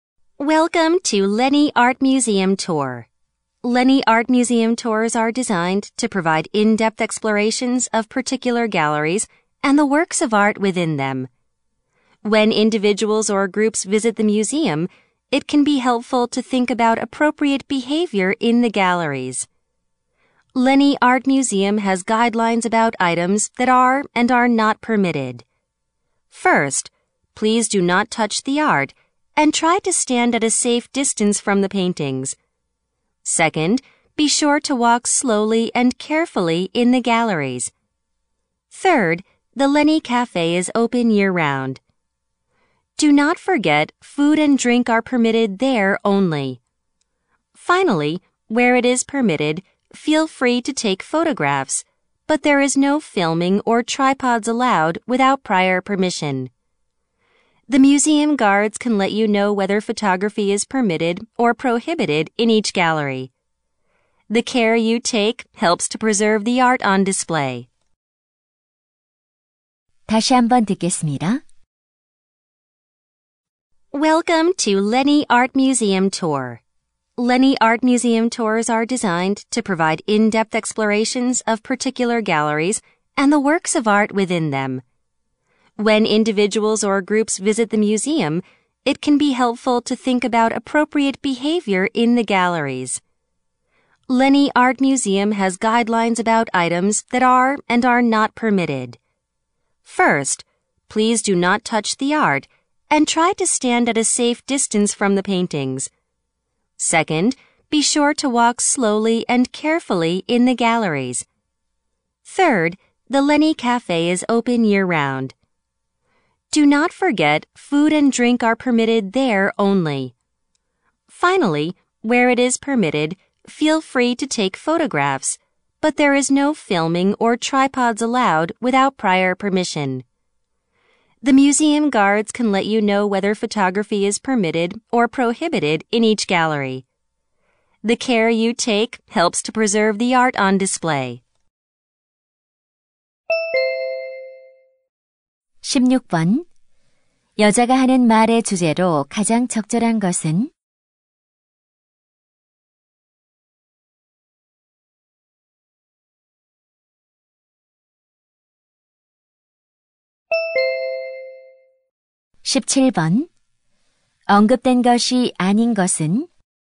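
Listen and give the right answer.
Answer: 미술관 관람 시 지켜야 할 규칙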